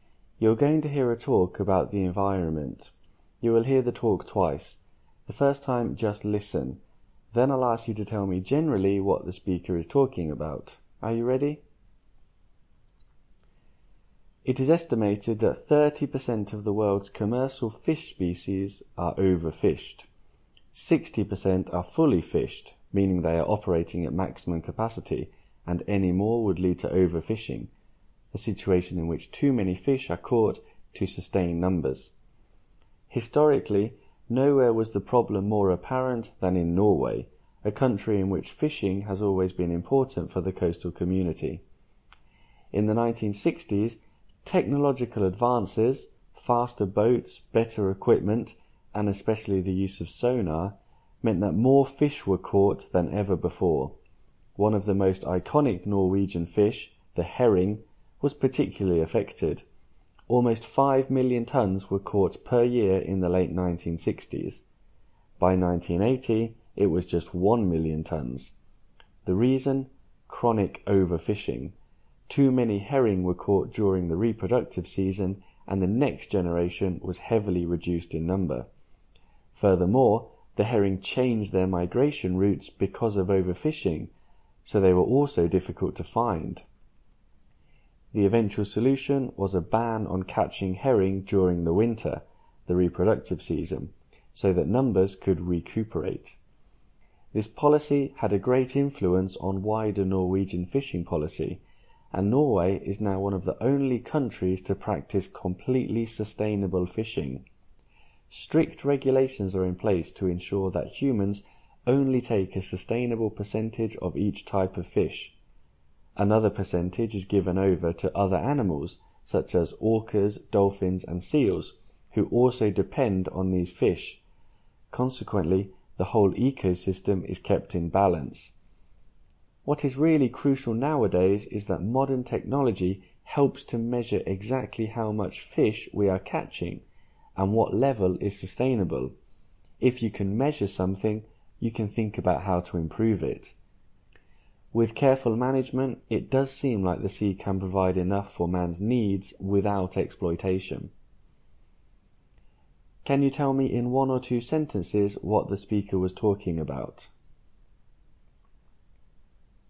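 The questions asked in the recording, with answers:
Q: Can you tell me in one or two sentences what the speaker was talking about?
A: Overfishing, especially of herring in Norway, and how sustainable fishing management can solve it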